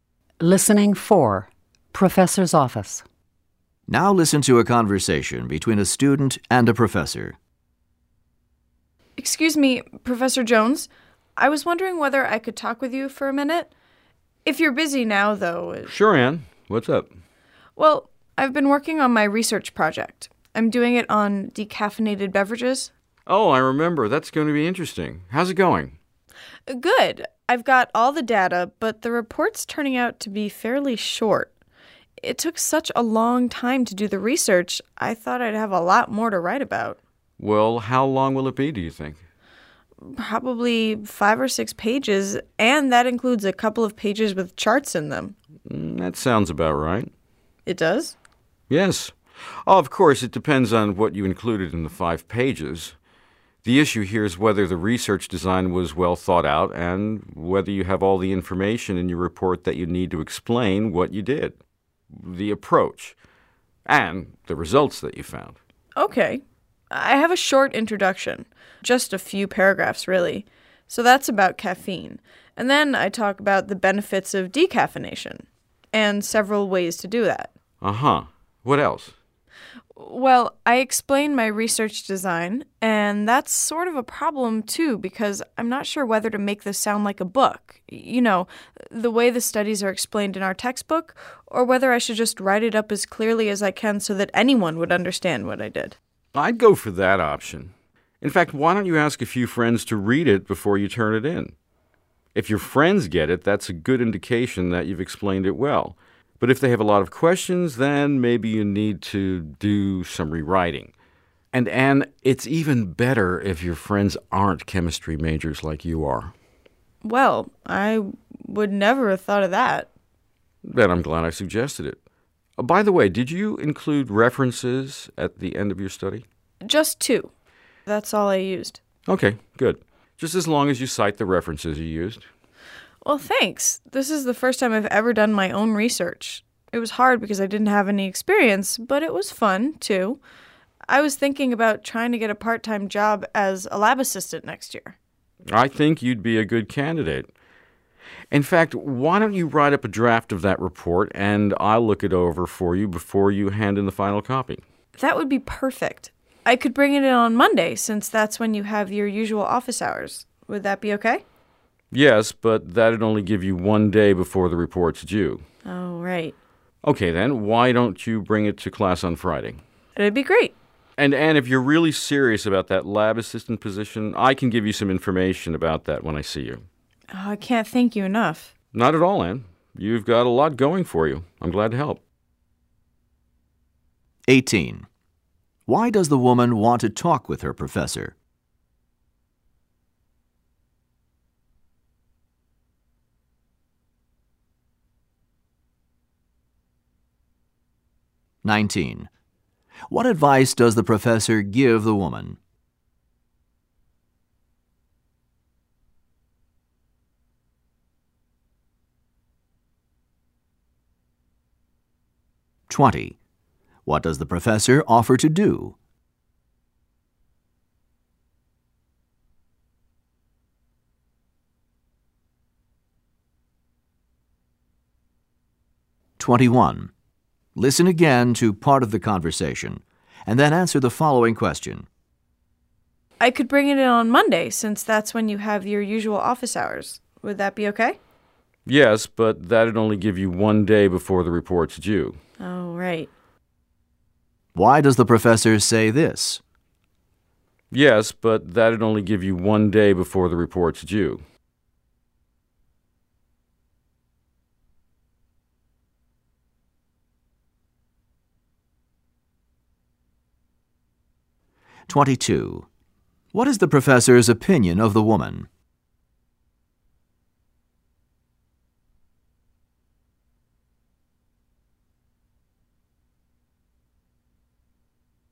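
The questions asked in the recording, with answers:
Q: Why does the woman want to talk with her professor?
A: She is worried that her research report is too short

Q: What advice does the professor give the woman?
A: Ask friends who aren't chemistry majors to read her report

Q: What does the professor offer to do?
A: Look over a draft of her report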